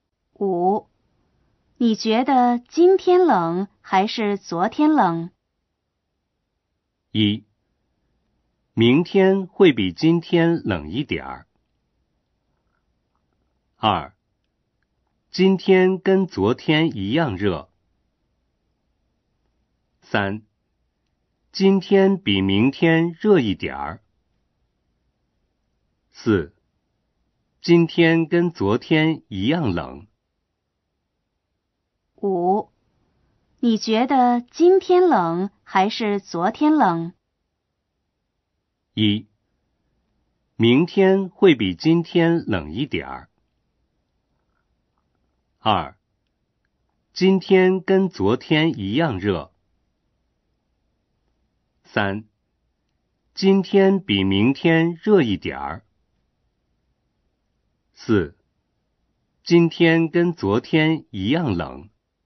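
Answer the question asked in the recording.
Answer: 四: 今天跟昨天一样冷。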